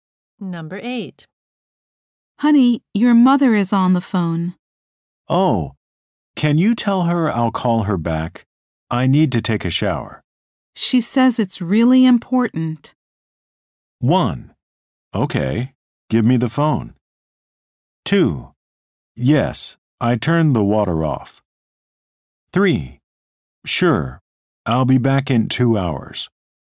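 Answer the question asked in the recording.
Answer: 1: Okay, give me the phone.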